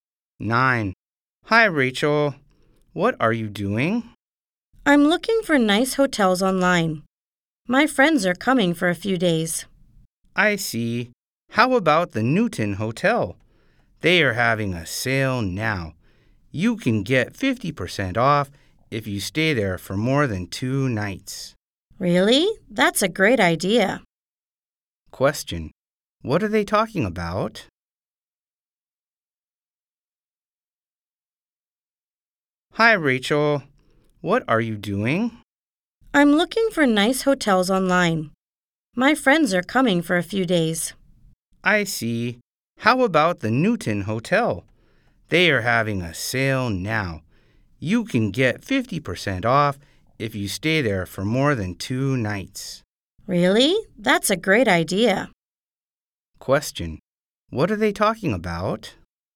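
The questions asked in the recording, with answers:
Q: What are they talking about?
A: Hotels (for Rachel's friends)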